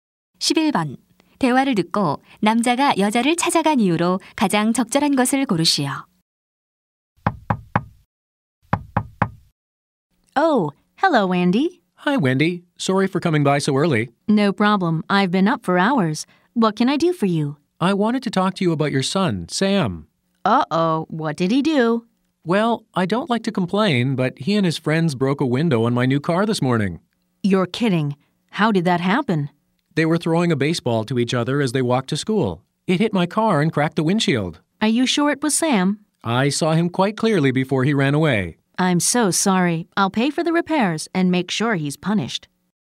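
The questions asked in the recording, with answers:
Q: 대화를 듣고 남자가 여자를 찾아간 이유로 가장 적절한 것을 고르시오.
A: 아들이 자동차 유리를 깬 것에 항의하려고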